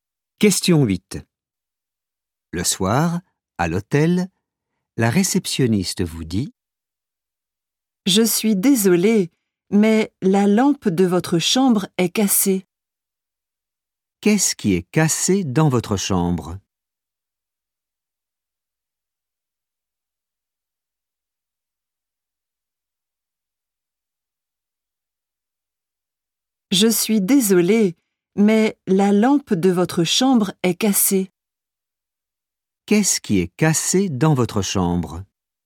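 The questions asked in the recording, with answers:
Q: Qu'est-ce qui est cassé dans votre chambre ?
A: La lampe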